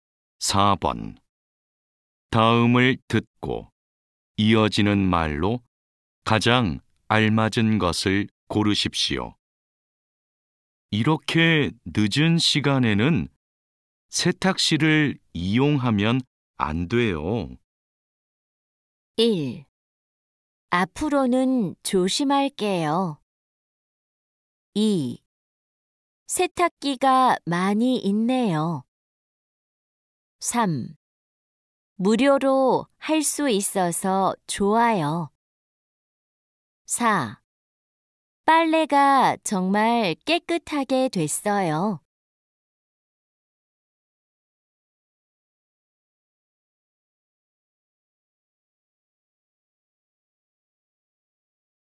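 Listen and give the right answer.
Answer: 1: 앞으로는 조심할게요.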